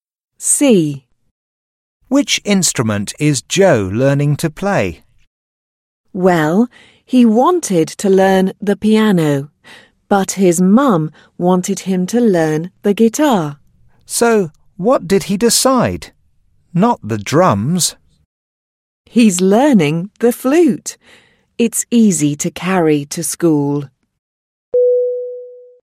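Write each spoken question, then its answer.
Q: Which instrument is Joe learning to play?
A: The flute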